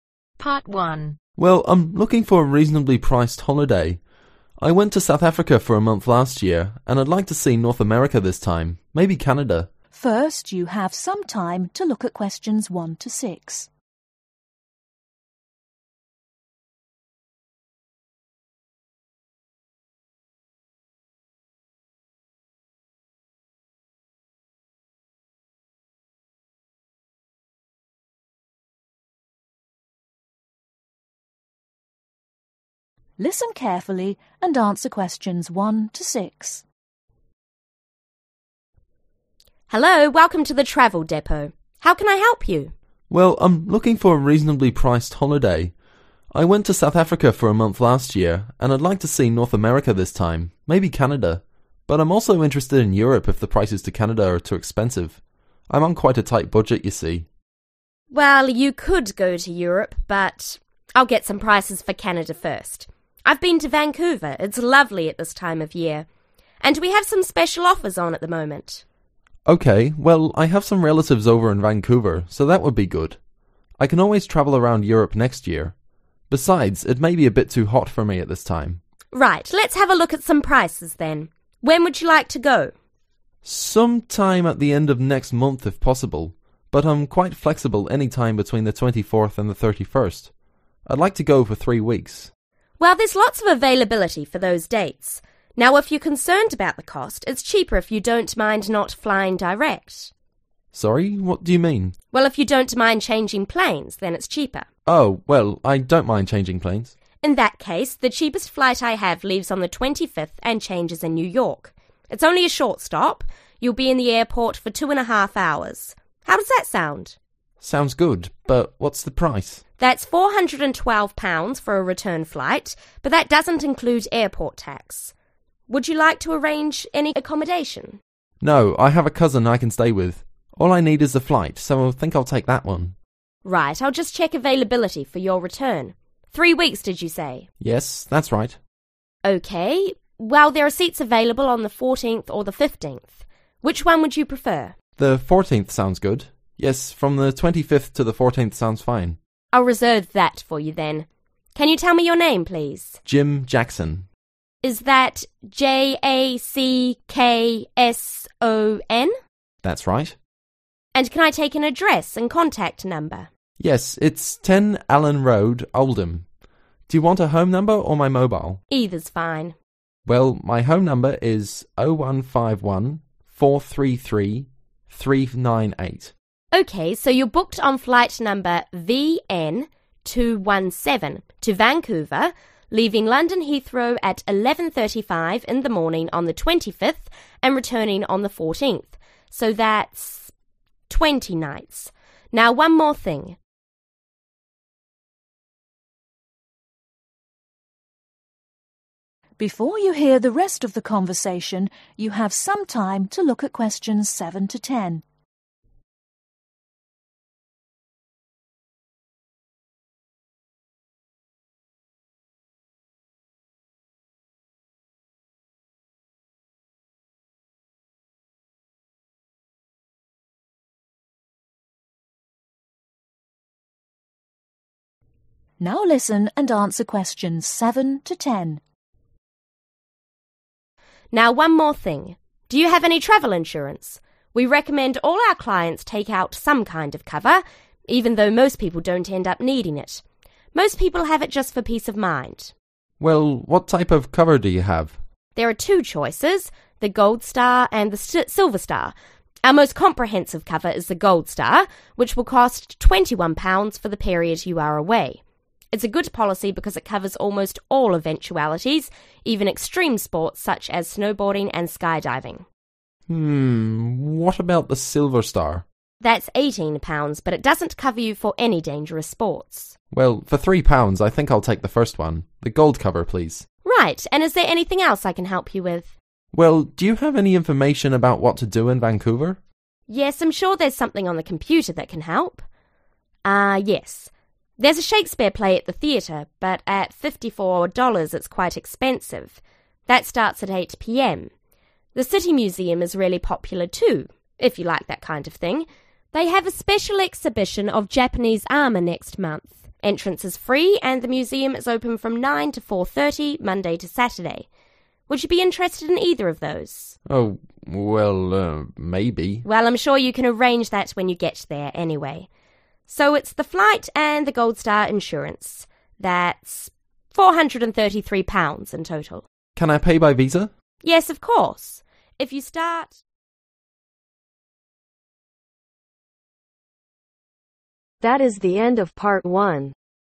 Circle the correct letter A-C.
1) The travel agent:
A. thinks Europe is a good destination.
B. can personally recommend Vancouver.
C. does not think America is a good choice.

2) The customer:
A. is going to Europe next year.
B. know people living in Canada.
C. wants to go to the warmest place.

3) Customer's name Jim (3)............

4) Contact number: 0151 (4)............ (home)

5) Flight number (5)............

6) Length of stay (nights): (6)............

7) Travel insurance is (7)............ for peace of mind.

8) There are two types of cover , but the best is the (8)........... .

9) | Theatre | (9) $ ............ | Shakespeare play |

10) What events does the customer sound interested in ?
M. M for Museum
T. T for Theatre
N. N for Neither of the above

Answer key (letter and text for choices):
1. B. can personally recommend Vancouver.
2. B. know people living in Canada.
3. Jackson
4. 433 398
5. VN217
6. 20
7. Recommended
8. Gold star
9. $54
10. N. N for Neither of the above